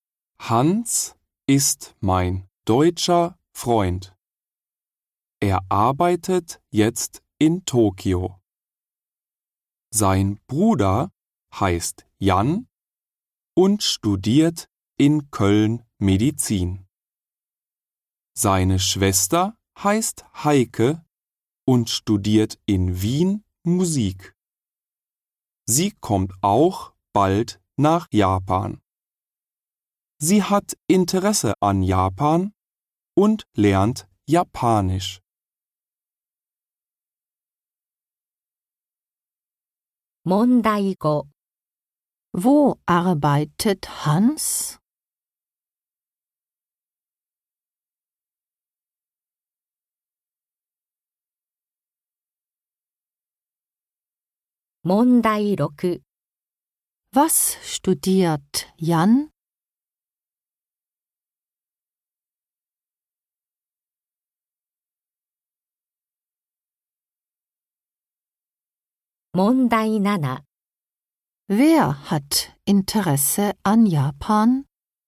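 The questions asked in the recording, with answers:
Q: Wo arbeitet Hans?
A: In Tokio

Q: Was studiert Jan?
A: Medizin

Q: Wer hat Interesse an Japan?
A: Heike (seine Schwester)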